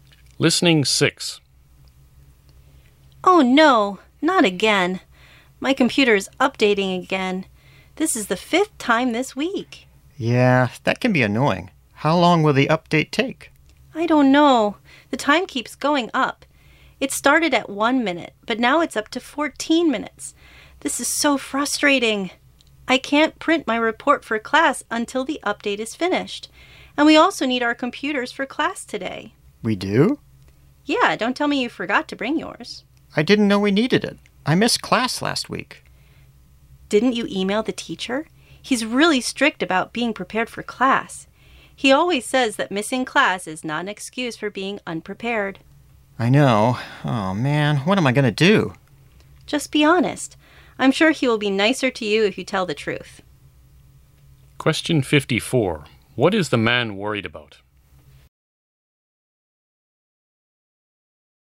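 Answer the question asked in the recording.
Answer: He forgot to bring his computer to class, and the teacher is strict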